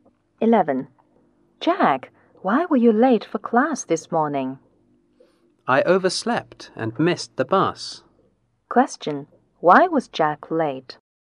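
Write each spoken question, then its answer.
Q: Why was Jack late?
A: He overslept and missed the bus.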